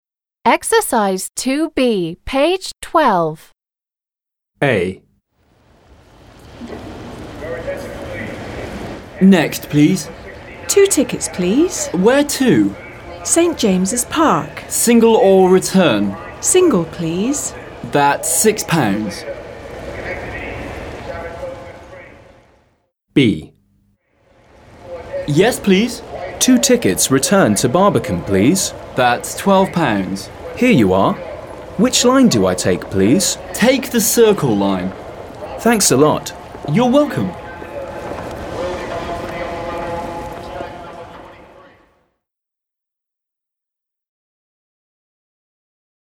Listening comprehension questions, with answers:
2. b) Read and listen to the dialogues and check. Where does each person want to go?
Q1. Where does each person want to go?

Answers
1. The first person wants to go to St. James's Park.

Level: 7 класс